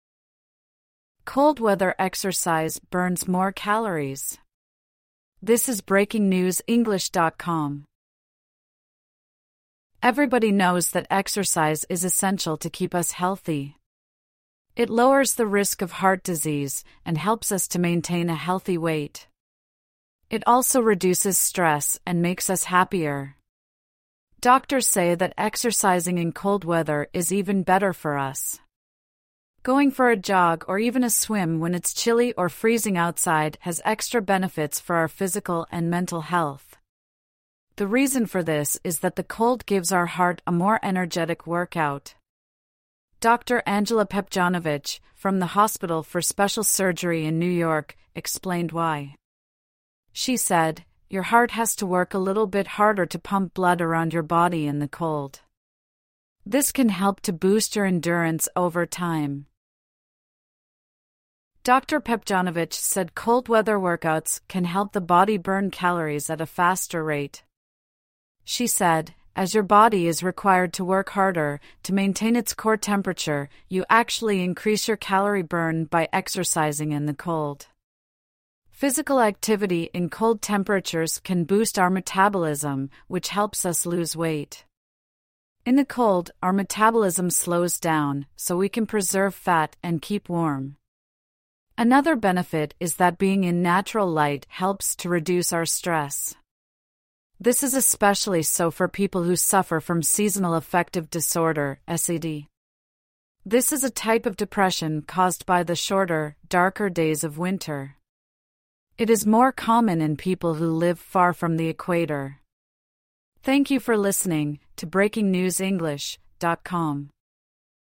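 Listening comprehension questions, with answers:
True / False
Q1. The article says most of us know that exercise is good for our health.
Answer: T

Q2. A doctor said going for a swim in cold weather is bad for us.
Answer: F

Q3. Exercising in cold weather is good for our mental health.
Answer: T

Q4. Exercising in cold weather can boost our endurance.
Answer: T

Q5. Cold weather means we burn calories at a slower rate.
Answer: F

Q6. Boosting our metabolism makes us put on weight.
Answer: F

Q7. The article said being in natural light makes us less stressed.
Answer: T

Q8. More people with S.A.D. live near the equator.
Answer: F

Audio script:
(1/27) Cold weather exercise burns more calories
Everybody knows that exercise is essential to keep us healthy. It lowers the risk of heart disease, and helps us to maintain a healthy weight. It also reduces stress and makes us happier. Doctors say that exercising in cold weather is even better for us. 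Going for a jog or even a swim when it's chilly or freezing outside has extra benefits for our physical and mental health. The reason for this is that the cold gives our heart a more energetic workout. Dr Angela Pepdjonovic, from the Hospital for Special Surgery in New York, explained why. She said: "Your heart has to work a little bit harder to pump blood around your body...in the cold. This can help to boost your endurance over time."
Dr Pepdjonovic said cold-weather workouts can help the body burn calories at a faster rate. She said: "As your body is required to work harder to maintain its core temperature, you actually increase your calorie burn by exercising in the cold." Physical activity in cold temperatures can boost our metabolism, which helps us lose weight. In the cold, our metabolism slows down, so we can preserve fat and keep warm. Another benefit is that being in natural light helps to reduce our stress. 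This is especially so for people who suffer from Seasonal Affective Disorder (S.A.D.). This is a type of depression caused by the shorter, darker days of winter. It is more common in people who live far from the equator.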